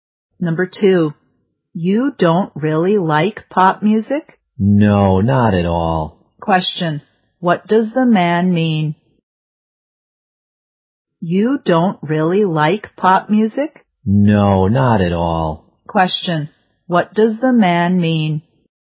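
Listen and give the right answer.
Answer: He doesn't like pop music at all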